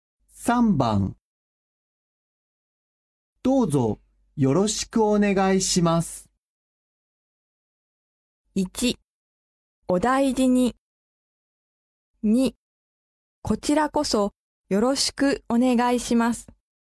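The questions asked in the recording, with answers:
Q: どうぞよろしくお願いします。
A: 2: こちらこそよろしくお願いします。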